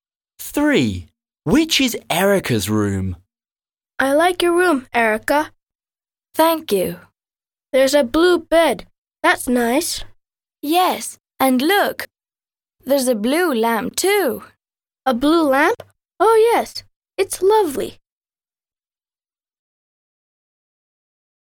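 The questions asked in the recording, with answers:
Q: Which is Erica's room?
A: The room with a blue bed and a blue lamp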